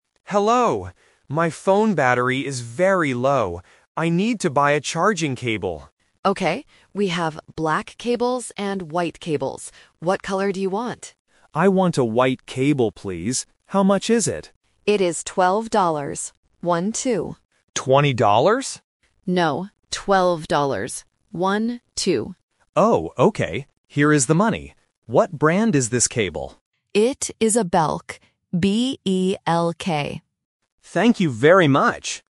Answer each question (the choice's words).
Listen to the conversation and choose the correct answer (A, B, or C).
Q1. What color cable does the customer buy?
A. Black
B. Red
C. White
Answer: White

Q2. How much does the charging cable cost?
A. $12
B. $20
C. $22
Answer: $12

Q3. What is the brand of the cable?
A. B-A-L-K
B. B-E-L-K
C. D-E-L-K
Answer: B-E-L-K

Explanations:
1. The correct answer is C. The customer clearly says, "I want a white cable, please." Option A (Black) is the trap because the assistant mentions it ("We have black cables..."), but the customer does not choose it. Option B (Red) is a plausible color but is not mentioned in the audio.
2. The correct answer is A. The assistant says the price is "12 dollars. One-two." Option B ($20) is the trap because the customer mishears the price at first and asks "20 dollars?", and the numbers "twelve" and "twenty" can sound similar to beginners. Option C is not mentioned.
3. The correct answer is B. The assistant clearly spells the brand name: "B-E-L-K". Option A (B-A-L-K) is a trap because the letters "A" and "E" are often confused in English pronunciation. Option C (D-E-L-K) is a trap because the letters "B" and "D" can sound similar.